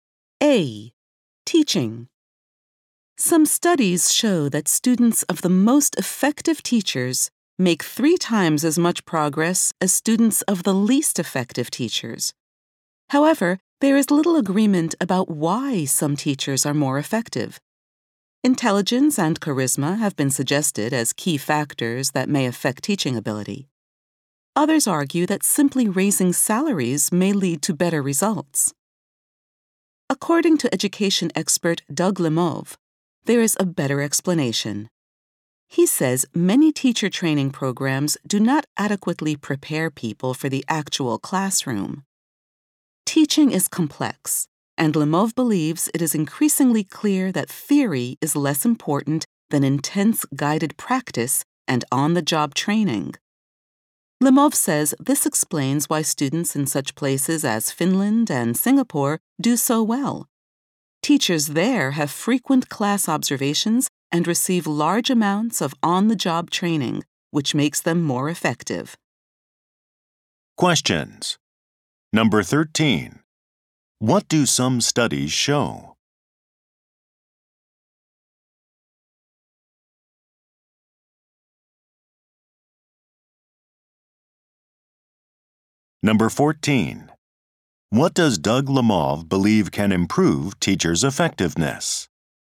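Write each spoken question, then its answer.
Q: What do some studies show?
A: Students of the most effective teachers make three times as much progress as those of the least effective teachers.

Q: What does Doug Lemov believe can improve teachers' effectiveness?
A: Intense guided practice and on-the-job training.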